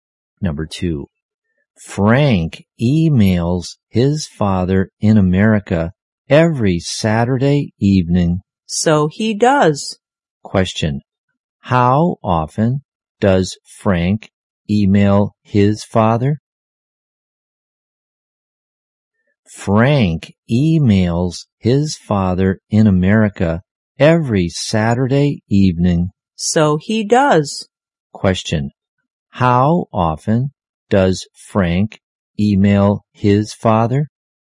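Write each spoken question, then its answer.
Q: how often does Frank email his father?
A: Once a week (every Saturday evening)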